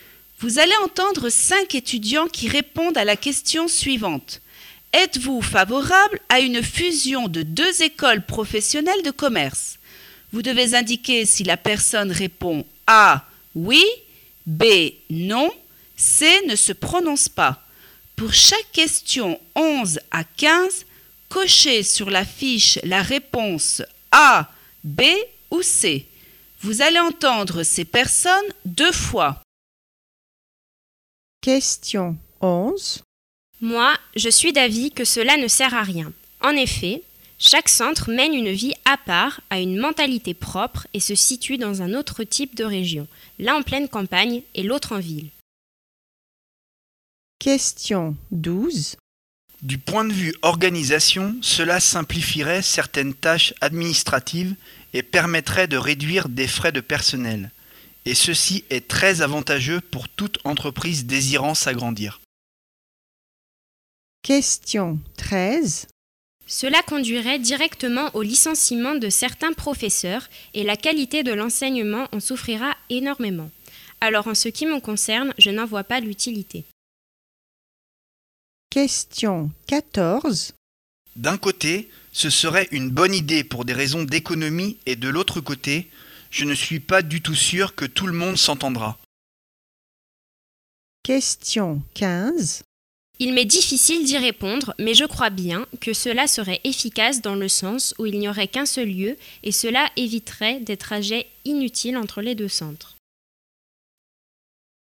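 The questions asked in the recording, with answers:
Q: Êtes-vous favorable à une fusion de 2 écoles professionnelles de commerce?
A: B: non

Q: Êtes-vous favorable à une fusion de 2 écoles professionnelles de commerce?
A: A: oui

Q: Êtes-vous favorable à une fusion de 2 écoles professionnelles de commerce?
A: B: non

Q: Êtes-vous favorable à une fusion de 2 écoles professionnelles de commerce?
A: C: ne se prononce pas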